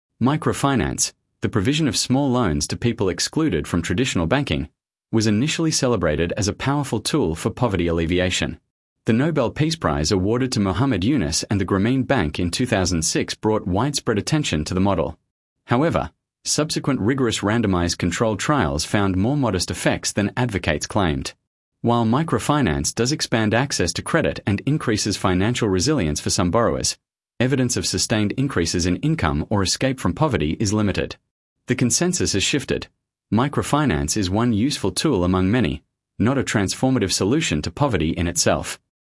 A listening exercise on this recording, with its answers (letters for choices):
Select the paragraph that best summarises the recording.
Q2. Sample Text 2 — Microfinance Evaluation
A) A. Microfinance programmes have been proven to eliminate poverty wherever they have been implemented.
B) B. Evidence suggests microfinance improves financial resilience but has weaker long-term effects on income and poverty reduction than originally claimed.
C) C. Grameen Bank's model has been shown to be ineffective and is no longer being replicated internationally.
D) D. Microfinance is only effective for male entrepreneurs and has no measurable impact on women's economic empowerment.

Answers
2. B